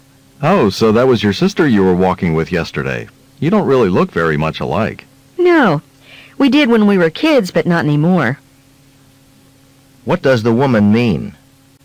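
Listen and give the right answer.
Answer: She and her sister looked alike as children but don't now.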